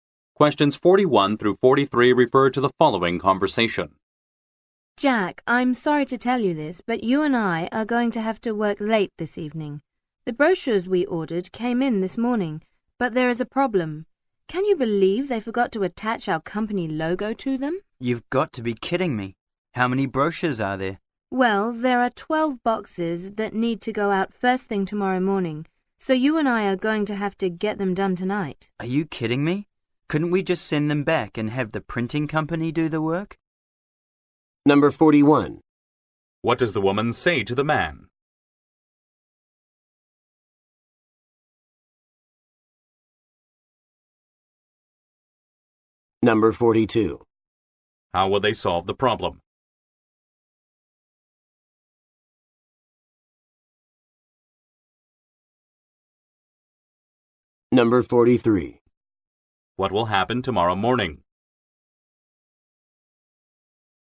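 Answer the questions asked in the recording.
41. They will have to work late this evening
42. By attaching the logo to the brochures themselves tonight
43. The brochures will be sent out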